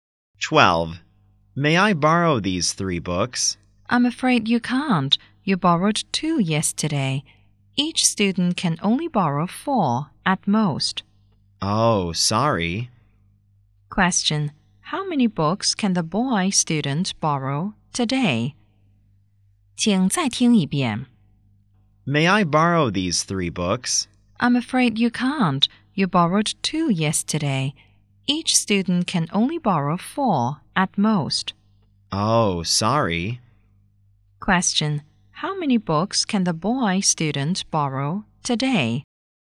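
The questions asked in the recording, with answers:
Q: Question: How many books can the boy student borrow today?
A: Two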